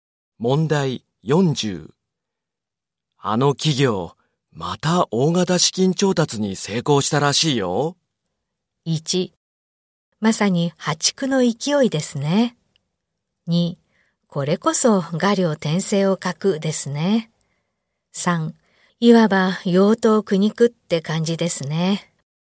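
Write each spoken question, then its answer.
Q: あの企業、また大型資金調達に成功したらしいよ。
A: 1: まさに破竹の勢いですね。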